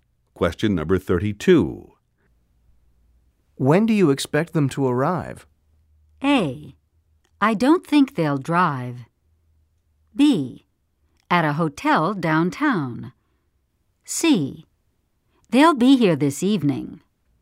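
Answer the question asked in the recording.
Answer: C: They'll be here this evening.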